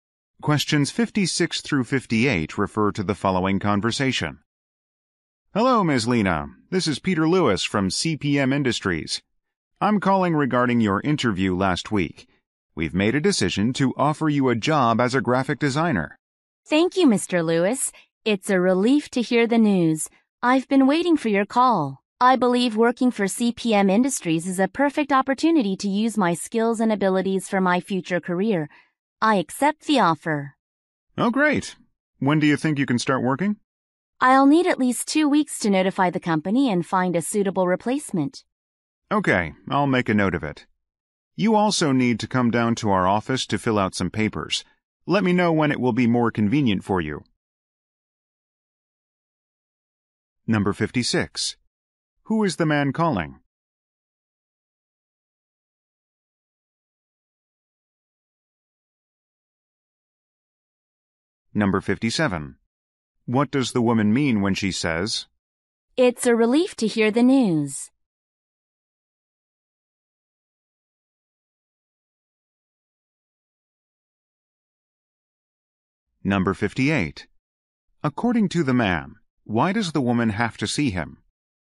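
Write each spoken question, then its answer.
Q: Who is the man calling?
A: A job applicant

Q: What does the woman mean when she says,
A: She is glad she got the job

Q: According to the man, why does the woman have to see him?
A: To fill out some papers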